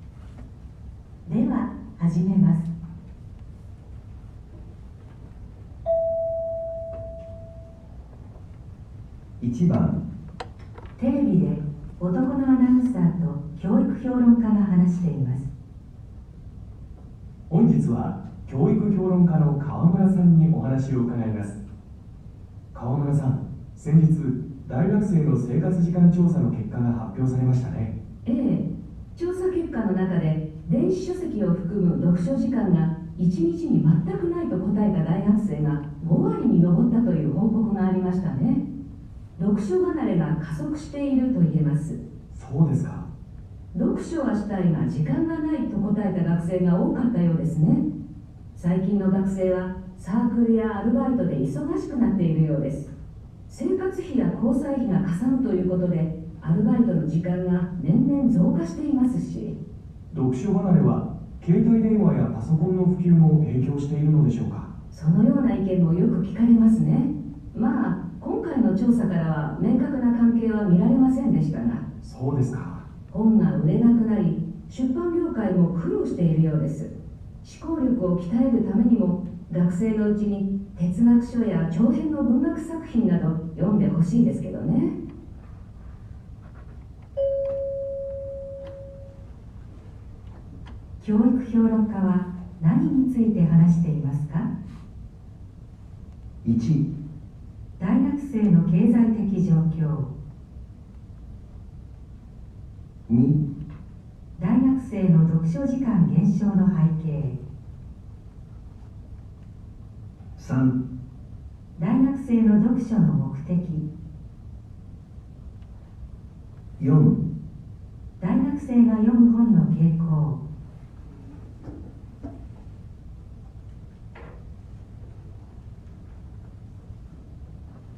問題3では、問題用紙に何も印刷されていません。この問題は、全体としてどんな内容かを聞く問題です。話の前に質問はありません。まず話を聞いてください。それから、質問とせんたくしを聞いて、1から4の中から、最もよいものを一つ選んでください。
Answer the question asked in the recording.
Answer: 2

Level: N1 Listening · Test 2